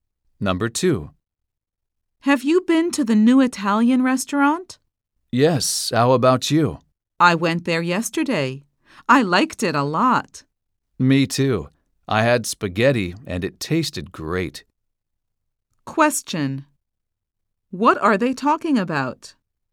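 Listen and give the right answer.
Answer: The new Italian restaurant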